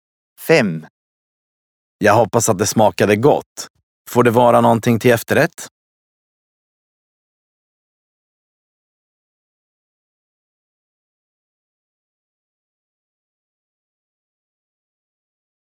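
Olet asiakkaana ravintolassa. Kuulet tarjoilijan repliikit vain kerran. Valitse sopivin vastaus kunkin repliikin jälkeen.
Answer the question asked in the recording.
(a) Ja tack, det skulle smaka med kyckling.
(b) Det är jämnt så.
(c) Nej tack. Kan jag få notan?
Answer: (c) Nej tack. Kan jag få notan?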